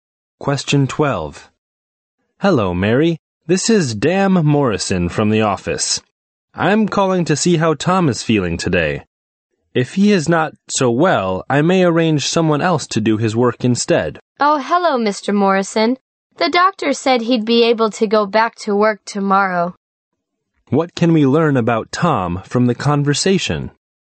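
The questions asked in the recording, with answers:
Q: What can we learn about Tom from the conversation?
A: He is ill but will be able to go back to work tomorrow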